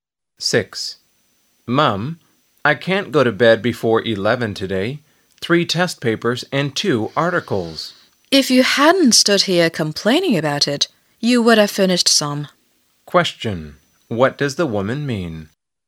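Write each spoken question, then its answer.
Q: What does the woman mean?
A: The boy should stop complaining and start working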